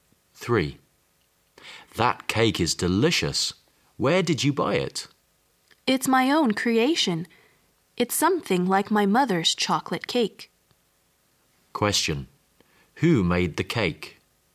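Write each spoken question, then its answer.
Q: Who made the cake?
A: The woman herself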